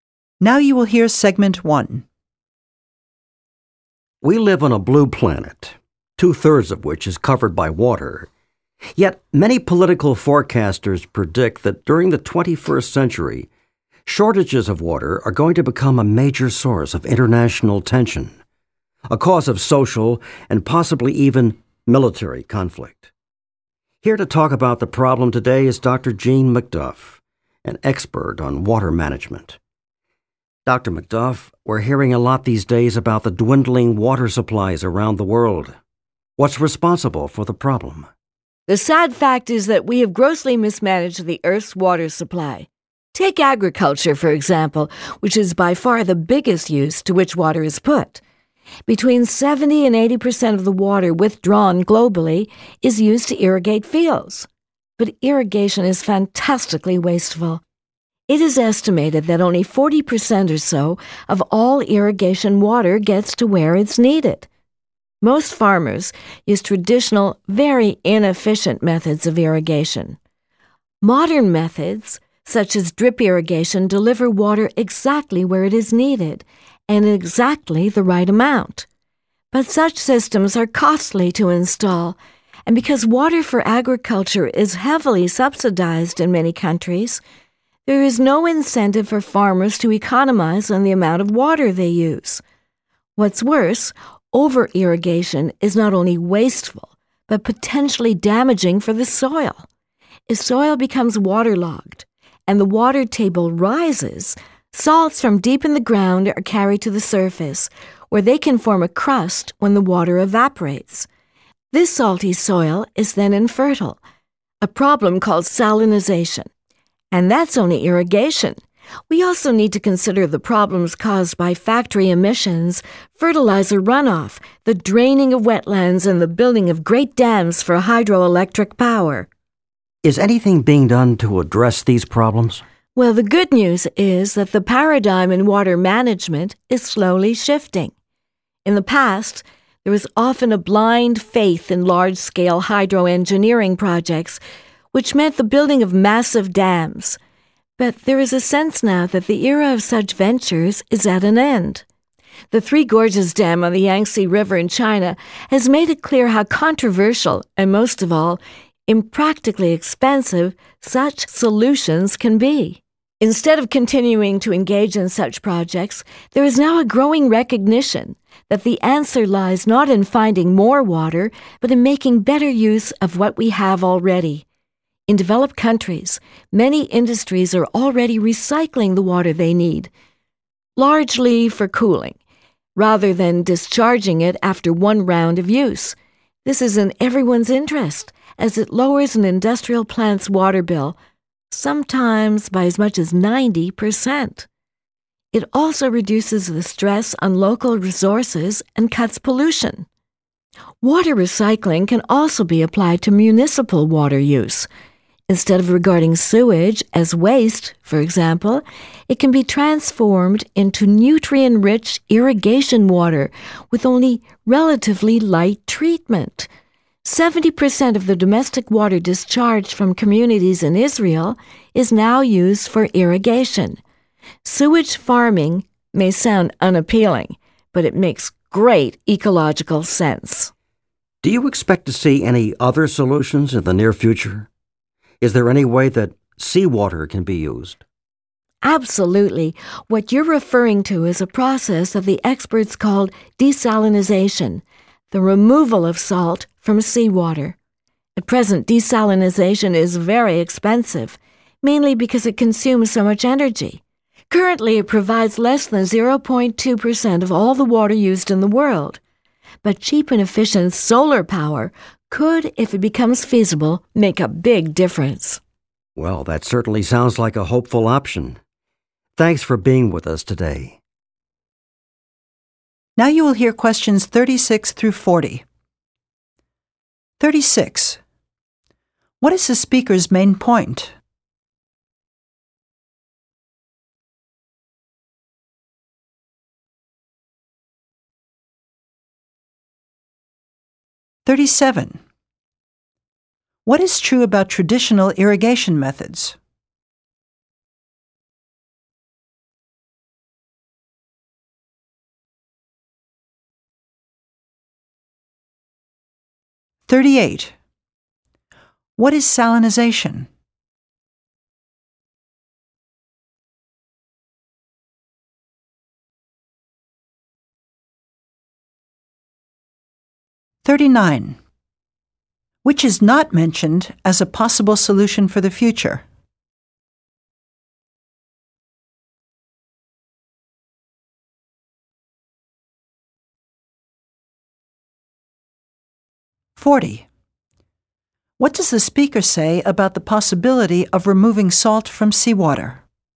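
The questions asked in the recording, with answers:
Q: What is true about traditional irrigation methods?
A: They are very inefficient and wasteful; only about 40% of the water gets where it is needed

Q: What is salinization?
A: Soil becoming salty and infertile because over-irrigation brings salts to the surface

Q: What does the speaker say about the possibility of removing salt from seawater?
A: It is very expensive now because it uses so much energy, but cheap solar power could make it practical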